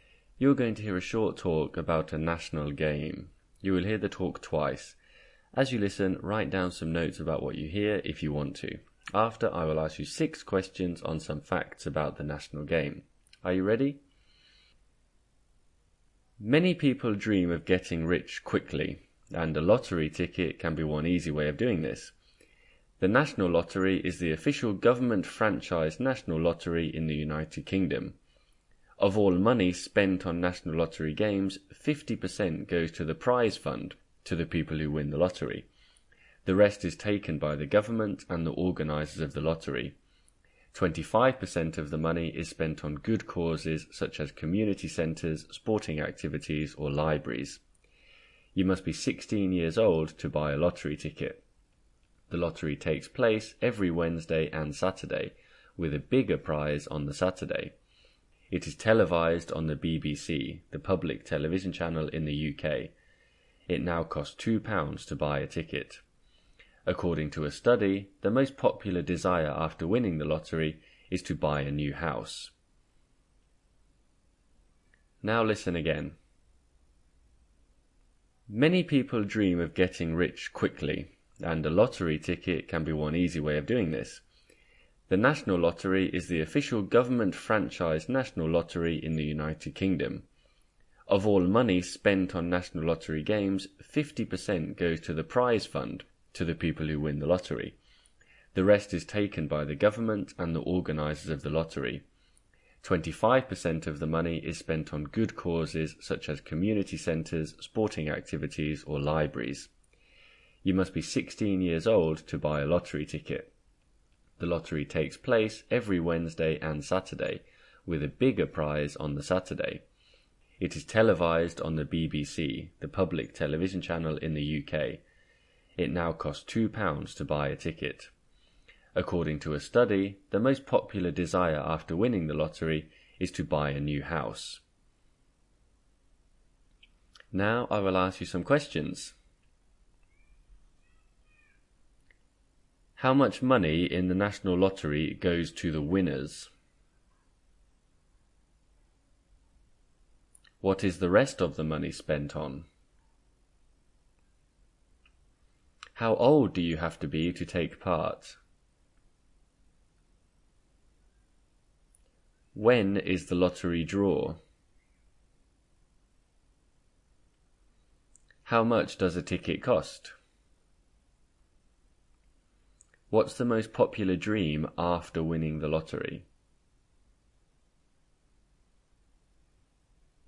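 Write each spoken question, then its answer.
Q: How much money in the National Lottery goes to the winners?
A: 50%

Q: How old do you have to be to take part?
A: 16 years old

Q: When is the lottery draw?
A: Every Wednesday and Saturday

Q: What's the most popular dream after winning the lottery?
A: To buy a new house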